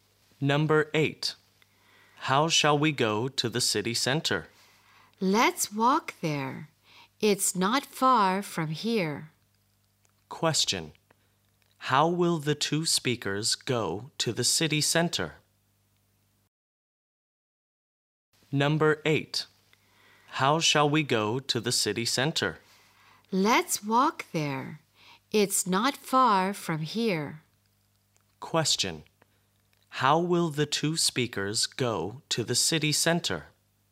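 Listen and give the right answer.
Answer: On foot; they will walk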